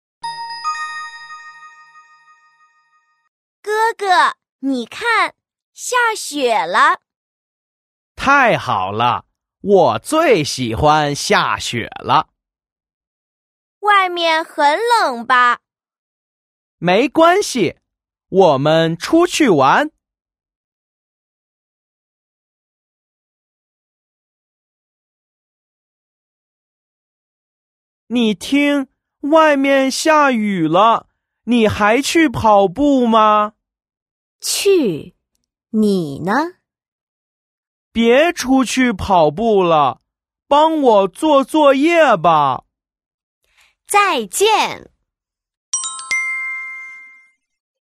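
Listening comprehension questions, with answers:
Sau khi đã đọc xong nội dung bài khóa, các em hãy trả lời các câu hỏi sau nhé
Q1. 哥哥想做什么?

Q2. 弟弟想让姐姐做什么?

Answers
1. 出去玩
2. 帮他做作业

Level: YCT 3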